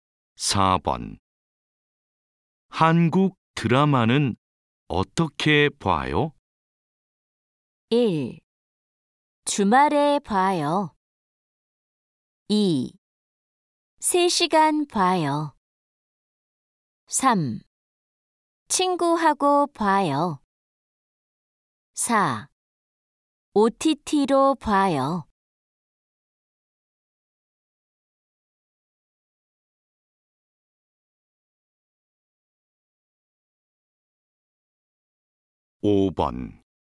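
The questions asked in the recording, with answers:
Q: 한국 드라마는 어떻게 봐요?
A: 4: OTT로 봐요.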